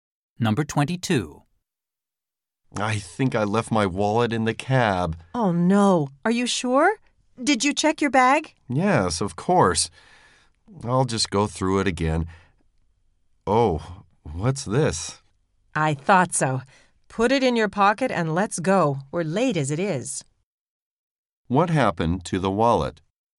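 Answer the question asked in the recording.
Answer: It was in the bag all along.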